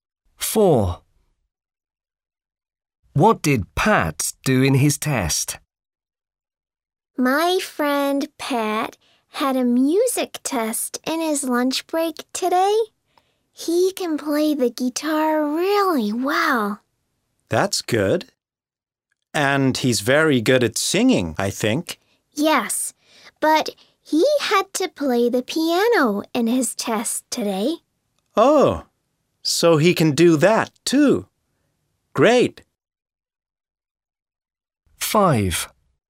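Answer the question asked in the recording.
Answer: played the piano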